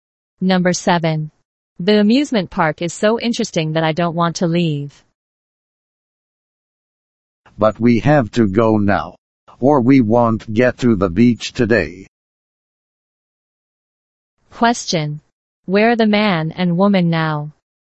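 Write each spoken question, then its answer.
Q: Where are the man and woman now?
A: At the amusement park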